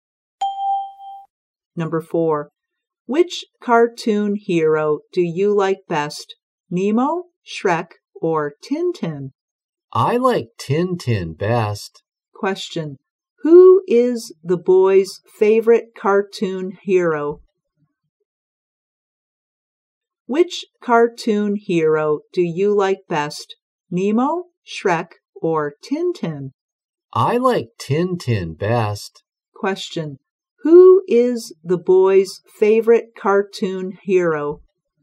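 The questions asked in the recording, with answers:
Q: who is the boy's favorite cartoon hero?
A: Tintin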